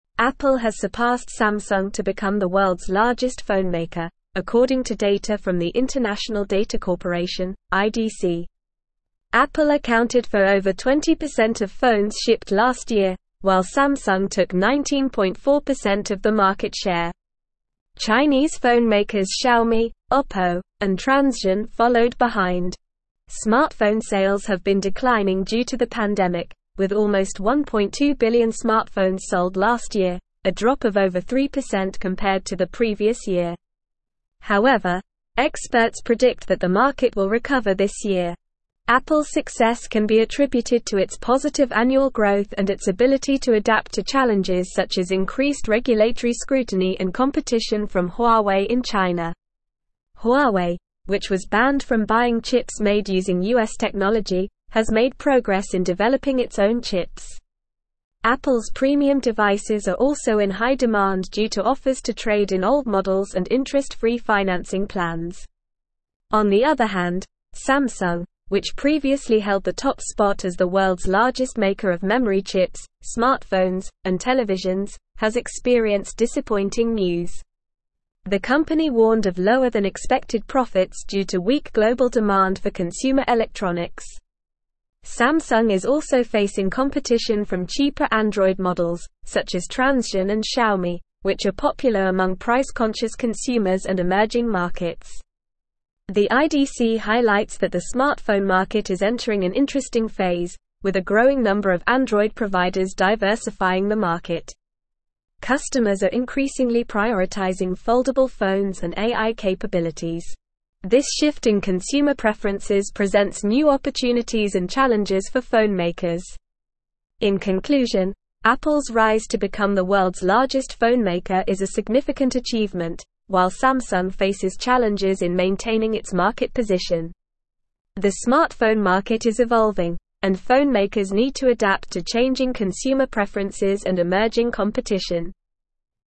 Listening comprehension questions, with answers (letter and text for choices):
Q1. According to the International Data Corporation (IDC), which company is currently the world's largest phonemaker?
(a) Samsung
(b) Xiaomi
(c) OPPO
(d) Apple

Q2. How much of the market share did Apple account for in phone shipments last year?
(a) 19.4%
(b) Less than 20%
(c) Over 20%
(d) More than 19.4%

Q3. Which country's phonemakers followed behind Apple and Samsung in market share?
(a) China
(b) Russia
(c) Spain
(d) Germany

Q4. Why have smartphone sales been declining?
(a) Due to the pandemic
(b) Due to increased regulatory scrutiny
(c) Due to competition from Huawei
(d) Due to a drop in demand for consumer electronics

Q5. How many smartphones were sold last year?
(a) Over 3%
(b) Less than the previous year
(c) Almost 1.2 billion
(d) None of the above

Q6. What is one factor contributing to Apple's success?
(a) Increased regulatory scrutiny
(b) Positive annual growth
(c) Competition from Huawei in China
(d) Weak global demand for consumer electronics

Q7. Which company was banned from buying chips made using US technology?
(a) Apple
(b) Huawei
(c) Samsung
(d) Xiaomi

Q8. What are customers increasingly prioritizing in smartphones?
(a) Price-conscious models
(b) Old models and interest-free financing plans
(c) None of the above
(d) Foldable phones and AI capabilities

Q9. (1)______ has surpassed Samsung to become the world's largest phonemaker, according to data from the International Data Corporation (IDC).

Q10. Apple accounted for over 20% of phones (2)______ last year, while Samsung took 19.4% of the market share.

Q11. Smartphone (3)______ have been declining due to the pandemic, with almost 1.2 billion smartphones sold last year, a drop of over 3% compared to the previous year.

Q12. However, (4)______ predict that the market will recover this year.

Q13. Apple's success can be attributed to its positive (5)______ growth and its (6)______ to adapt to challenges such as increased regulatory scrutiny and competition from Huawei in China.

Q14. Apple's success can be attributed to its positive (5)______ growth and its (6)______ to adapt to challenges such as increased regulatory scrutiny and competition from Huawei in China.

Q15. Apple's premium devices are also in high demand due to (8)______ to trade in old models and interest-free financing plans.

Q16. On the other hand, Samsung, which previously held the top spot as the world's largest maker of memory chips, smartphones, and televisions, has experienced (9)______ news.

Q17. The (10)______ warned of lower-than-expected profits due to weak global demand for consumer electronics.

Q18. Samsung is also facing competition from cheaper Android (11)______, such as Transsion and Xiaomi, which are popular among price-conscious consumers and emerging markets.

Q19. The IDC highlights that the smartphone market is entering an interesting (12)______, with a growing number of Android providers (13)______ the (14)______.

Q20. The IDC highlights that the smartphone market is entering an interesting (12)______, with a growing number of Android providers (13)______ the (14)______.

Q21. Customers are increasingly prioritizing foldable phones and AI (15)______.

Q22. The smartphone market is evolving, and phonemakers need to adapt to changing consumer preferences and (16)______ competition.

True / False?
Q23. Samsung warned of lower-than-expected profits due to weak global demand for consumer electronics.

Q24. Experts predict that the smartphone market will recover this year.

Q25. Apple accounted for under 20% of phones shipped last year.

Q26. Samsung took less than 19.4% of the market share in the phone industry.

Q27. Chinese phonemakers Xiaomi, OPPO, and Transsion followed behind Apple and Samsung.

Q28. Apple has not surpassed Samsung to become the world's largest phonemaker.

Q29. Smartphone sales increased by over 3% last year due to the pandemic.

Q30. Apple's success can be attributed to its positive annual growth and ability to adapt to challenges.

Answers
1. (d) Apple
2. (c) Over 20%
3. (a) China
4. (a) Due to the pandemic
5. (c) Almost 1.2 billion
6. (b) Positive annual growth
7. (b) Huawei
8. (d) Foldable phones and AI capabilities
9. Apple
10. shipped
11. sales
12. experts
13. annual
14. ability
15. offers
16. disappointing
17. company
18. models
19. phase
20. diversifying
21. capabilities
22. emerging
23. True
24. True
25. False
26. False
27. True
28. False
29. False
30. True

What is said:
Apple has surpassed Samsung to become the world's largest phonemaker, according to data from the International Data Corporation (IDC). Apple accounted for over 20% of phones shipped last year, while Samsung took 19.4% of the market share. Chinese phonemakers Xiaomi, OPPO, and Transsion followed behind. Smartphone sales have been declining due to the pandemic, with almost 1.2 billion smartphones sold last year, a drop of over 3% compared to the previous year. However, experts predict that the market will recover this year.
Apple's success can be attributed to its positive annual growth and its ability to adapt to challenges such as increased regulatory scrutiny and competition from Huawei in China. Huawei, which was banned from buying chips made using US technology, has made progress in developing its own chips. Apple's premium devices are also in high demand due to offers to trade in old models and interest-free financing plans.
On the other hand, Samsung, which previously held the top spot as the world's largest maker of memory chips, smartphones, and televisions, has experienced disappointing news. The company warned of lower-than-expected profits due to weak global demand for consumer electronics. Samsung is also facing competition from cheaper Android models, such as Transsion and Xiaomi, which are popular among price-conscious consumers and emerging markets.
The IDC highlights that the smartphone market is entering an interesting phase, with a growing number of Android providers diversifying the market. Customers are increasingly prioritizing foldable phones and AI capabilities. This shift in consumer preferences presents new opportunities and challenges for phonemakers.
In conclusion, Apple's rise to become the world's largest phonemaker is a significant achievement, while Samsung faces challenges in maintaining its market position. The smartphone market is evolving, and phonemakers need to adapt to changing consumer preferences and emerging competition.

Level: Level 4